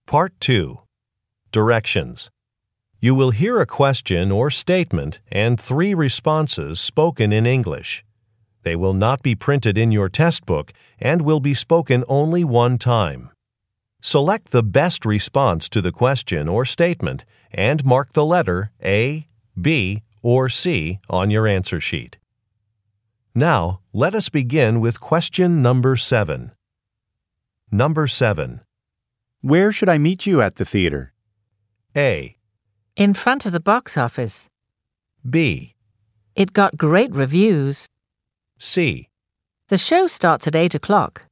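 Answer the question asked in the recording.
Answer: In front of the box office.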